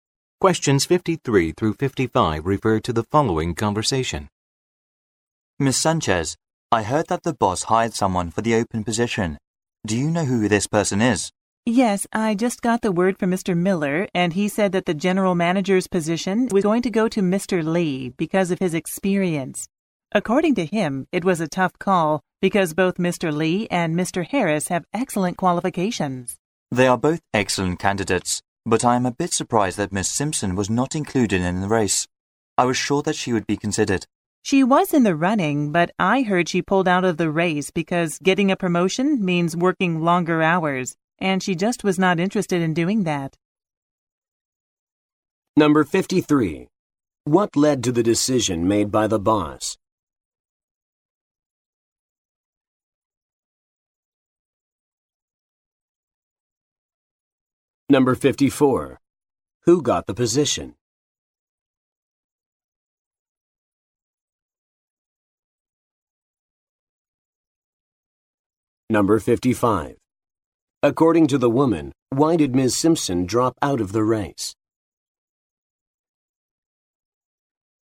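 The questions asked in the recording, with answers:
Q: What led to the decision made by the boss?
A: Mr. Lee's experience

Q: Who got the position?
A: Mr. Lee

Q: According to the woman, why did Ms.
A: She didn't want to work longer hours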